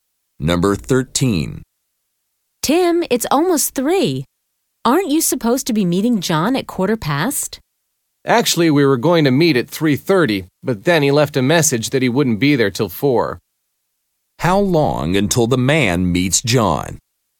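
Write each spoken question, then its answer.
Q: How long until the man meets John?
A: One hour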